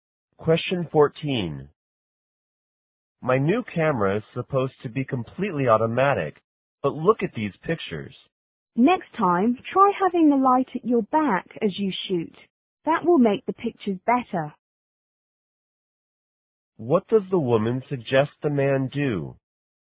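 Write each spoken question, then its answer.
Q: What does the woman suggest the man do?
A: Keep the light behind him when he takes pictures.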